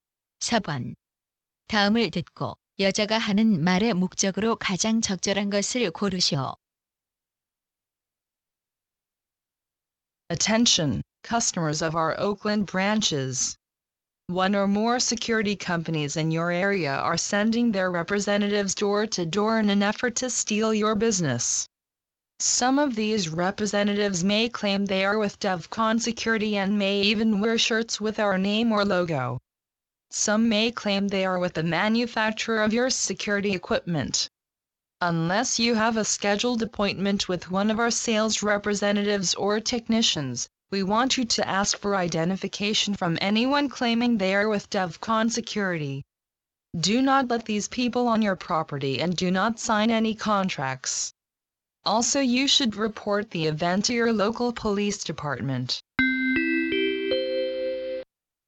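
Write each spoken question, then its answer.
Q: 다음을 듣고 여자가 하는 말의 목적으로 가장 적절한 것을 고르시오.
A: 보안업체 직원을 사칭하는 방문자를 주의하라고 경고하려고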